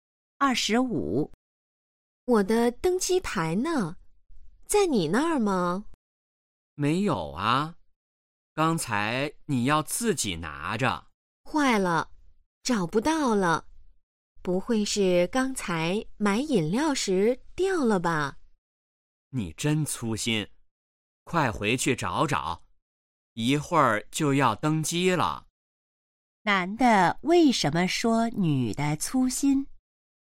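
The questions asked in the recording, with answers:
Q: 男的为什么说女的粗心?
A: 她把登机牌弄丢了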